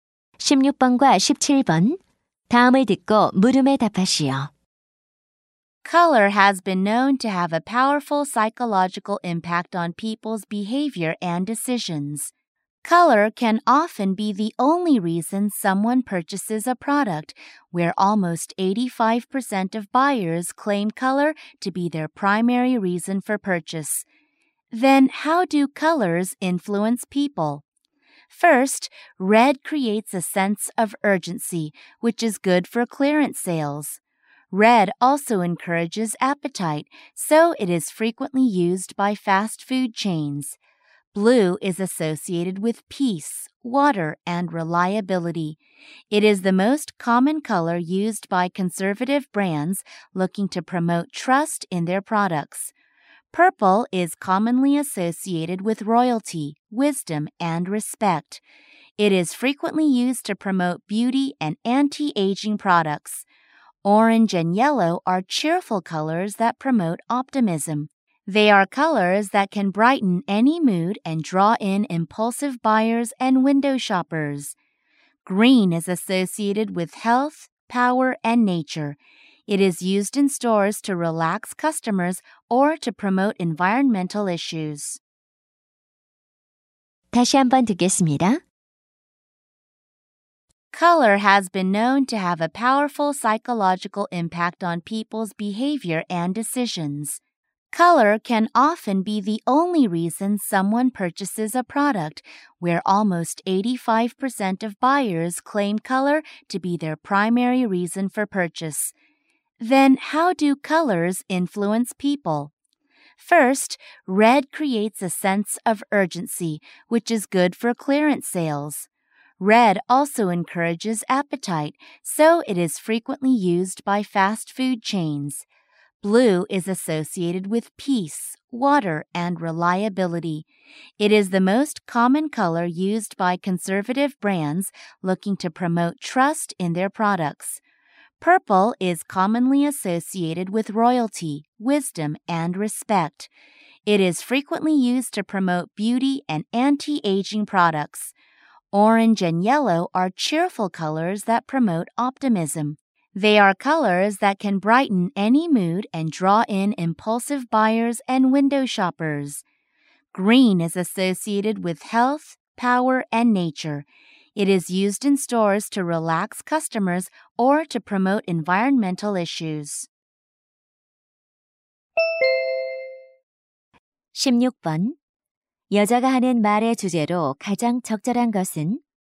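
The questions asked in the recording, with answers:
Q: 여자가 하는 말의 주제로 가장 적절한 것은?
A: 색깔이 소비자의 행동과 구매 결정에 미치는 심리적 영향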